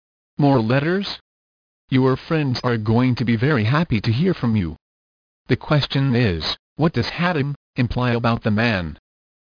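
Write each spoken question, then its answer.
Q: The question is, what does Haddam imply about the man?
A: He writes a lot of letters to his friends.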